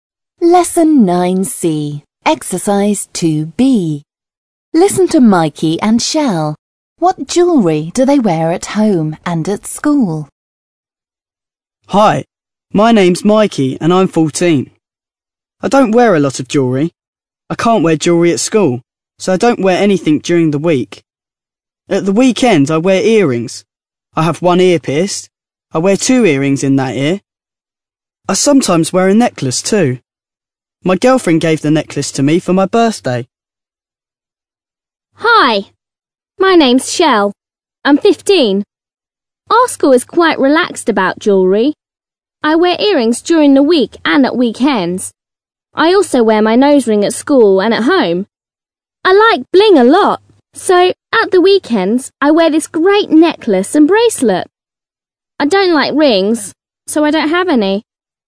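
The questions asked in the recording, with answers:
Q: What jewellery do they wear at home and at school?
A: Mikey: no jewellery at school; at the weekend, earrings and sometimes a necklace. Shell: earrings and a nose ring at school and at home, plus a necklace and bracelet at weekends.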